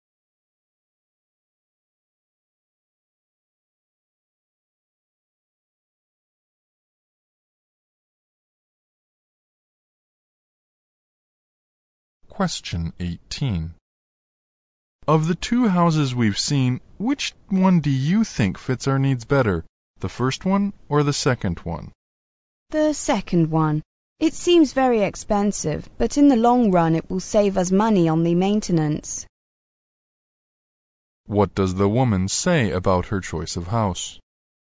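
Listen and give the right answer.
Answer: It is expensive but will save money on maintenance in the long run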